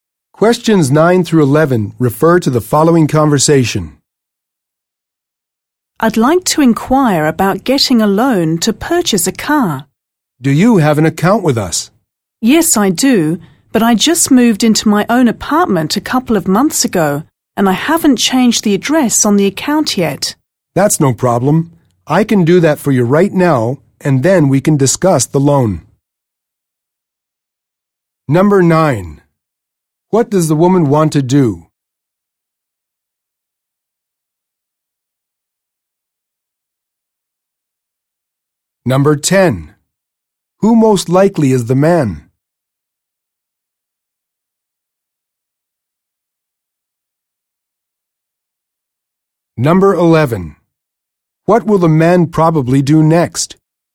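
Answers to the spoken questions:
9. Get a loan to buy a car
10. A bank employee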